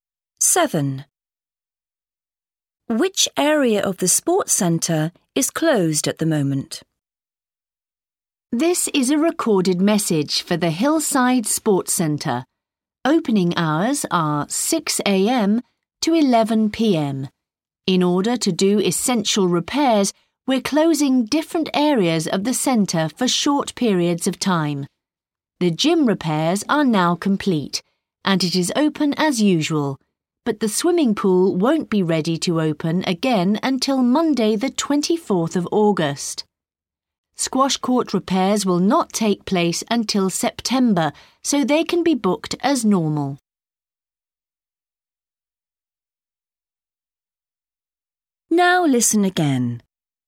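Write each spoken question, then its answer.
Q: Which area of the sports centre is closed at the moment?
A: the swimming pool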